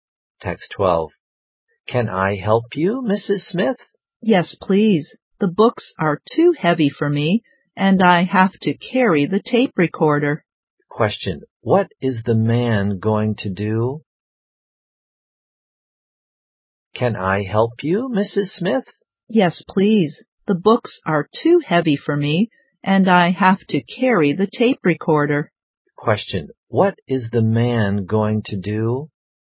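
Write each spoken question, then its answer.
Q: What is the man going to do?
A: Help Mrs. Smith carry the books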